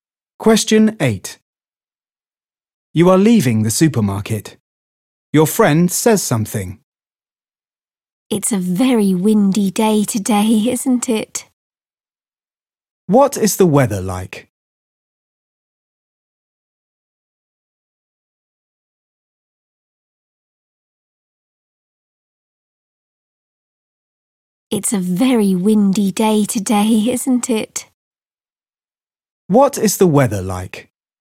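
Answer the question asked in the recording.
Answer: very windy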